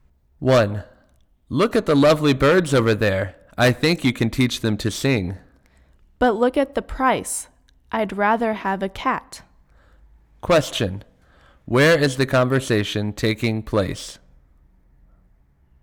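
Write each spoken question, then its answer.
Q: Where is the conversation taking place?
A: In a pet shop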